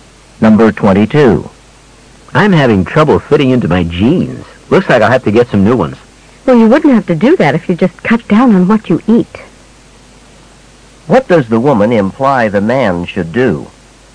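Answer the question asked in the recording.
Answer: Eat less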